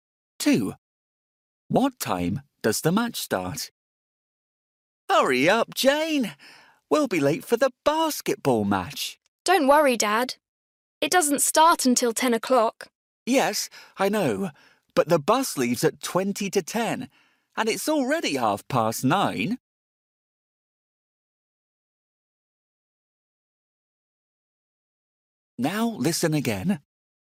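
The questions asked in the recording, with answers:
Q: What time does the match start?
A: 10 o'clock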